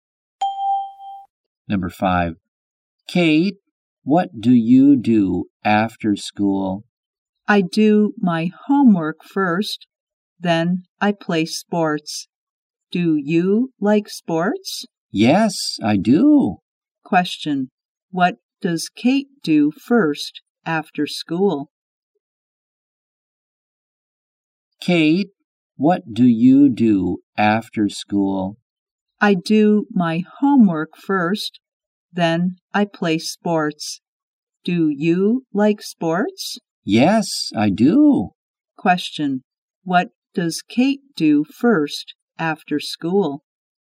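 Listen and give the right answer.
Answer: She does her homework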